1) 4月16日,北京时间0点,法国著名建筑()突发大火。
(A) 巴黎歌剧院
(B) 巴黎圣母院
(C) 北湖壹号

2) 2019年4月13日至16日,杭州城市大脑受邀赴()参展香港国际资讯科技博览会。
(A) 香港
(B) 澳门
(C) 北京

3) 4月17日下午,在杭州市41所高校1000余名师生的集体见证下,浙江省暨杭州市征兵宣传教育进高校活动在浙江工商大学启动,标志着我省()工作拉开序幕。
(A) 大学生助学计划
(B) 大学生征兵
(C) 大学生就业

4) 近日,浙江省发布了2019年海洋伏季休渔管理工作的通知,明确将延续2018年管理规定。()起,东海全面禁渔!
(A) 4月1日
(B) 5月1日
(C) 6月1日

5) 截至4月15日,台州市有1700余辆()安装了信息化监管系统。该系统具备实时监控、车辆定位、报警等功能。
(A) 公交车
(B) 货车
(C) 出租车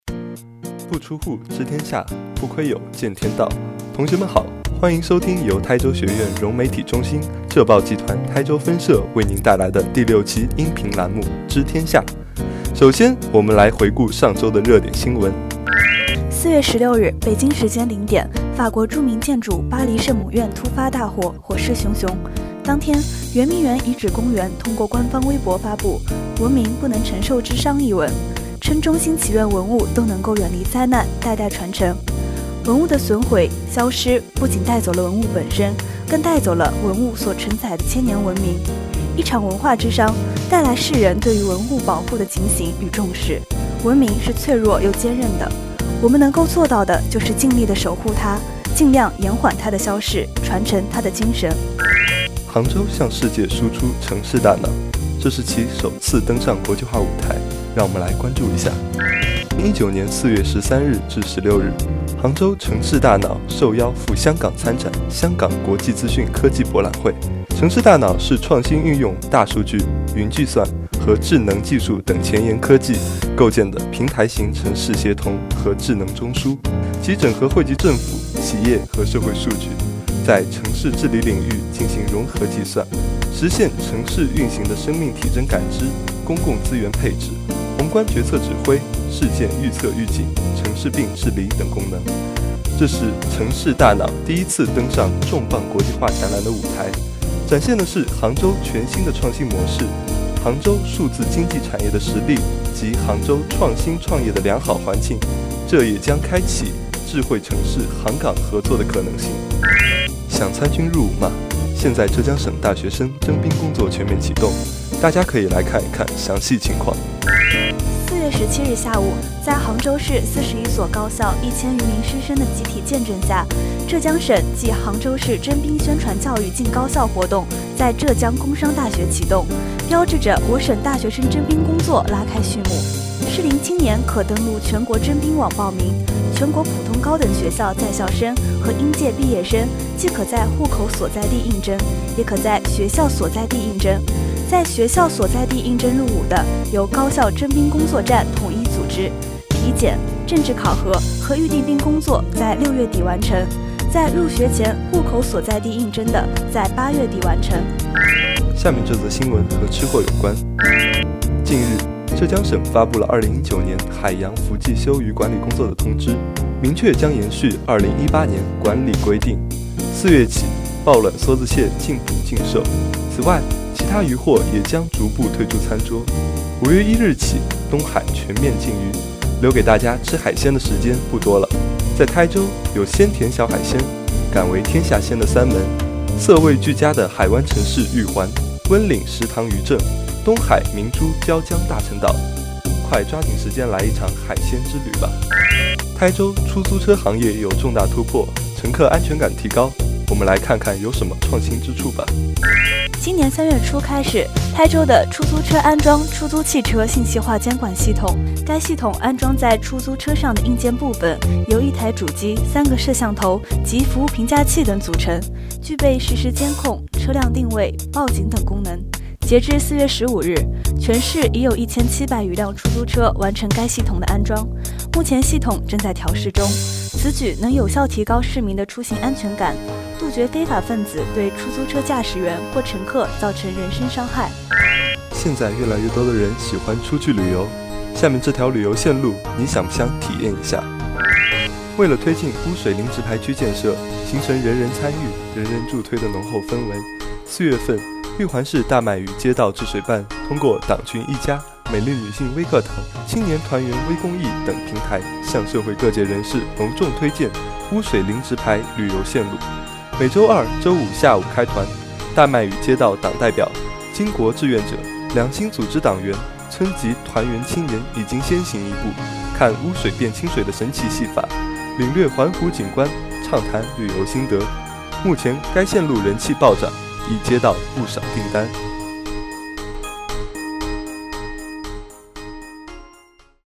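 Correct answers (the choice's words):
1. 巴黎圣母院
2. 香港
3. 大学生征兵
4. 5月1日
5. 出租车

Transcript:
同学们好,欢迎收听由台州学院融媒体中心、浙报集团台州分社为您带来的第六期音频栏目——《知天下》。
4月16日,北京时间0点,法国著名建筑巴黎圣母院突发大火,火势熊熊。当天,圆明园遗址公园通过官方微博发布《文明 不能承受之殇》一文,称衷心祈愿文物都能够远离灾难,代代传承。
文物的损毁、消失不仅带走了文物本身,更带走了文物所承载的千年文明。
一场文化之殇,带来世人对于文物保护的警醒与重视,文明是脆弱又坚韧的。
我们能够做到的就是尽力地守护它,尽量延缓它的消逝,传承它的精神。
2019年4月13日至16日,杭州城市大脑受邀赴香港参展香港国际资讯科技博览会。
"城市大脑"是创新运用大数据、云计算及智能技术等前沿科技构建的平台型城市协同和智能中枢,其整合汇集政府、企业和社会数据,在城市治理领域进行融合计算,实现城市运行的生命体征感知、公共资源配置、宏观决策指挥、事件预测预警、"城市病"治理等功能。
这次是城市大脑第一次登上重磅国际化展览的舞台,展现的是杭州全新的创新模式、杭州数字经济产业的实力及杭州创新创业的良好环境,也将开启智慧城市杭港合作的新可能。
4月17日下午,在杭州市41所高校1000余名师生的集体见证下,浙江省暨杭州市征兵宣传教育进高校活动在浙江工商大学启动,标志着我省大学生征兵工作拉开序幕。
适龄青年可登录"全国征兵网"报名,全国普通高等学校在校生和应届毕业生既可在户口所在地应征,也可在学校所在地应征。在学校所在地应征入伍的,由高校征兵工作站统一组织,体检、政治考核和预定兵工作在6月底完成。在入学前户口所在地应征的在8月底完成。
近日,浙江省发布了2019年海洋伏季休渔管理工作的通知,明确将延续2018年管理规定。4月起抱卵梭子蟹禁捕禁售!此外,其他鱼获也将逐步退出餐桌!
5月1日起,东海全面禁渔!留给大家吃海鲜的时间不多了!在台州,有鲜甜小海鲜,敢为天下鲜的三门,色味俱佳的海湾城市玉环,温岭石塘渔镇,东海明珠椒江大陈岛,快抓紧时间来一场海鲜之旅吧!
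今年3月初开始,台州的出租车安装出租汽车信息化监管系统。该系统安装在出租车上的硬件部分由一台主机、三个摄像头及服务评价器等组成,具备实时监控、车辆定位、报警等功能。截至4月15日,全市已有1700余辆出租车完成该系统的安装,目前系统正在调试中。此举能有效提高市民的出行安全感,杜绝非法分子对出租车驾驶员或乘客造成人身伤害。
为了推进"污水零直排区"建设,形成人人参与,人人助推的浓厚氛围,4月份,玉环市大麦屿街道治水办通过党群E家、美丽女性微讲堂、青年团员微公益等平台向社会各界人士隆重推荐"污水零直排旅游线路",每周二、周五下午开团。大麦屿街道党代表、巾帼志愿者、两新组织党员、村级团员青年已经先行一步,看 "浊水变清水"的神奇戏法,领略环湖景观,畅谈旅游"心得"。目前该线路人气暴涨,已接到不少"订单"。
本文作者: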